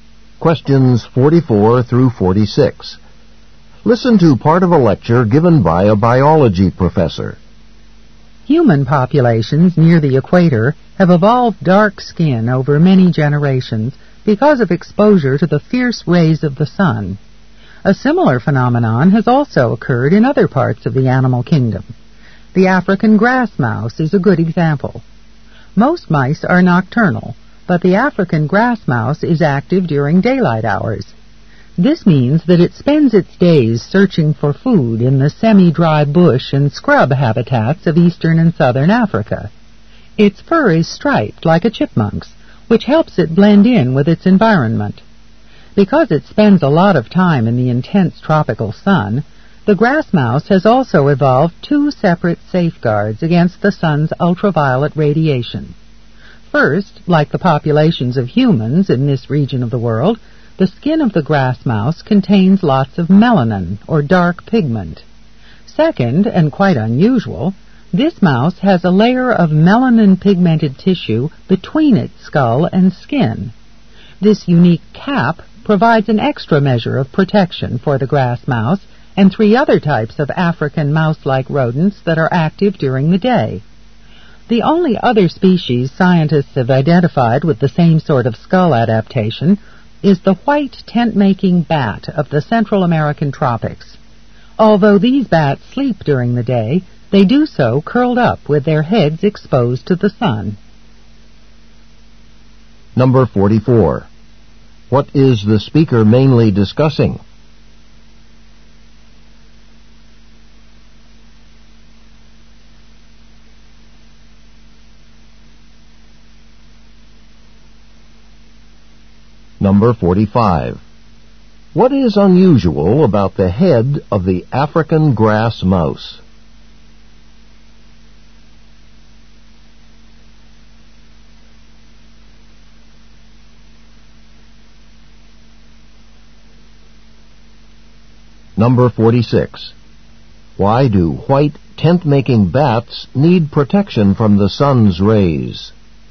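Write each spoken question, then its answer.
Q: What is the speaker mainly discussing?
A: How the African grass mouse has adapted to protect itself from the sun.

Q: What is unusual about the head of the African grass mouse?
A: It has a layer of melanin-pigmented tissue between its skull and skin.

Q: Why do white tent-making bats need protection from the sun's rays?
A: They sleep during the day with their heads exposed to the sun.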